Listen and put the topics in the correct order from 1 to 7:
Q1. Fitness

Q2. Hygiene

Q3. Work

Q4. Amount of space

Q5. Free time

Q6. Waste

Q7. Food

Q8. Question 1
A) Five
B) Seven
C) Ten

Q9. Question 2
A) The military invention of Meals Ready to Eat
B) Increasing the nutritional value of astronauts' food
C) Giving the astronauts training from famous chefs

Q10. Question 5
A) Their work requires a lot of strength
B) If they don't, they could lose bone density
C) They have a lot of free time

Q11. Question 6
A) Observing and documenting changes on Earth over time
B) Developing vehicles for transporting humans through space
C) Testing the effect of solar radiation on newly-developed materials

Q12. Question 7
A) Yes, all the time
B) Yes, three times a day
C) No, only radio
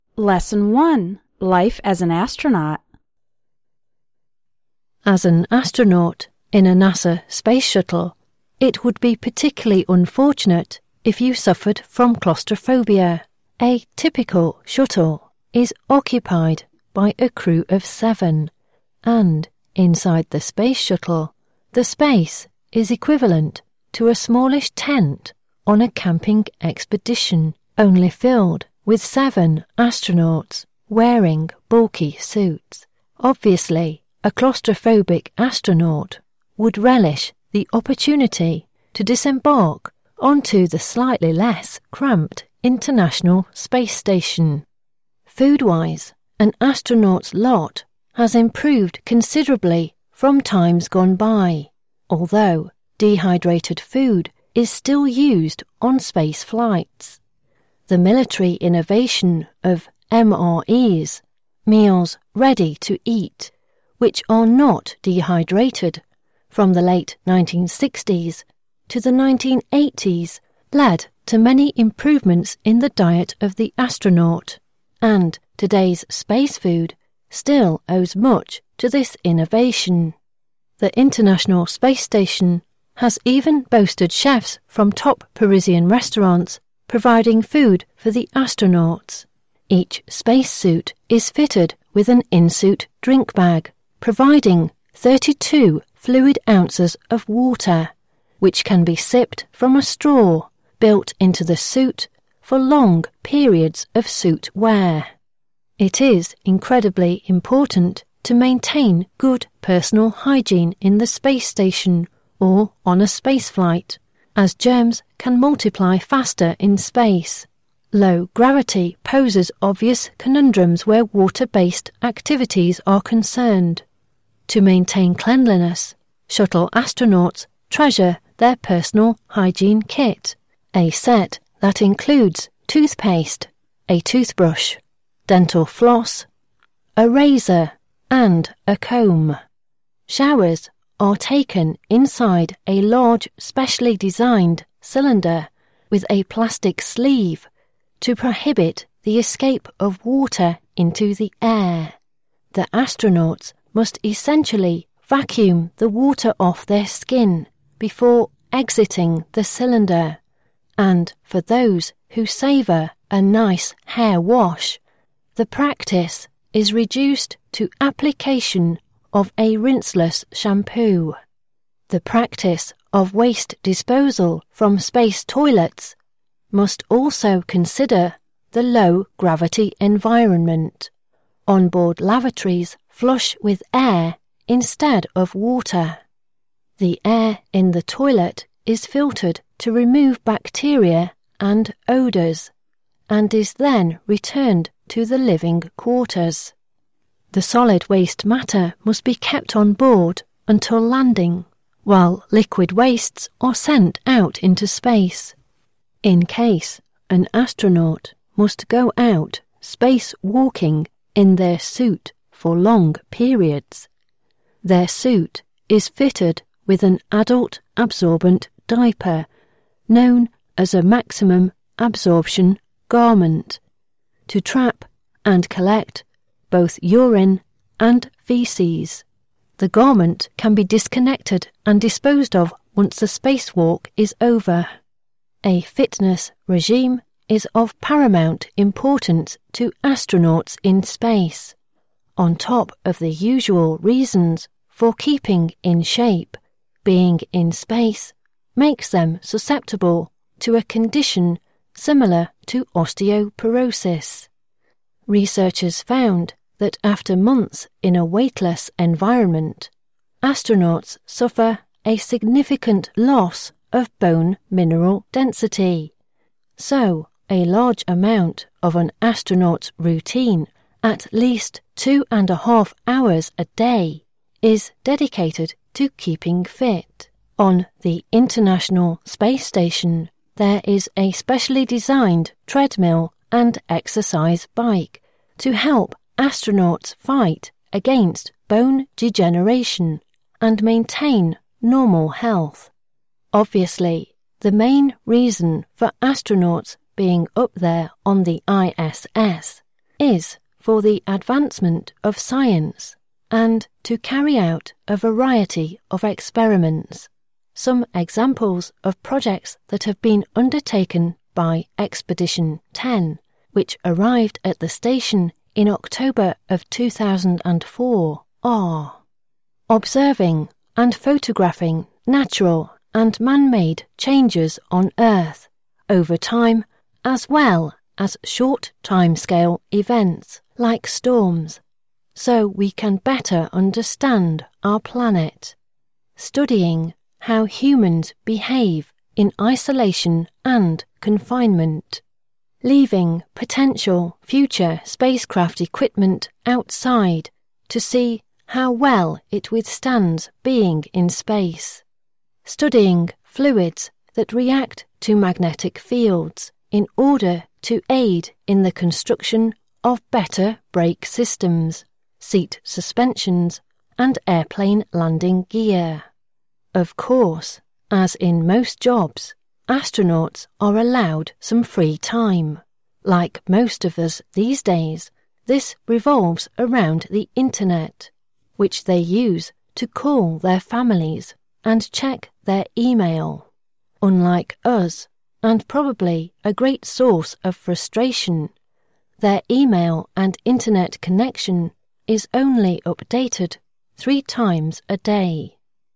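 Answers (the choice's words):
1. 5
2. 3
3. 6
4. 1
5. 7
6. 4
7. 2
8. Seven
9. The military invention of Meals Ready to Eat
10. If they don't, they could lose bone density
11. Observing and documenting changes on Earth over time
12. Yes, three times a day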